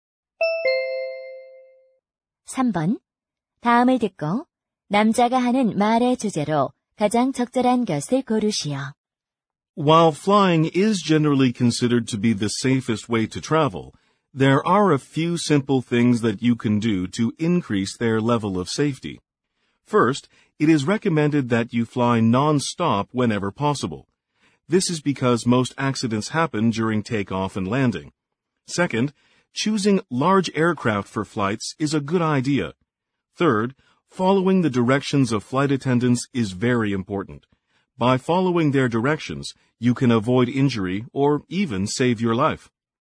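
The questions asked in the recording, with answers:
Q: 다음을 듣고 남자가 하는 말의 주제로 가장 적절한 것을 고르시오.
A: 비행기 여행의 안전을 높이는 방법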